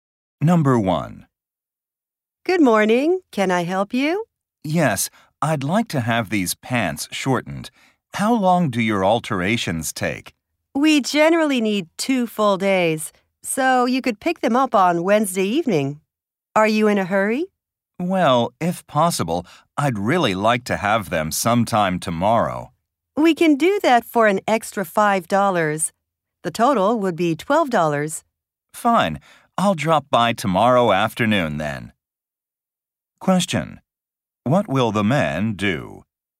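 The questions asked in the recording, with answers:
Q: What will the man do?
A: Pay an extra $5 and pick up the pants tomorrow afternoon.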